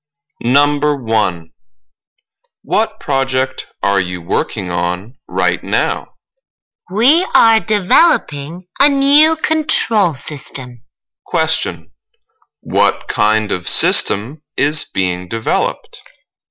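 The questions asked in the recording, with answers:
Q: What kind of system is being developed?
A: A new control system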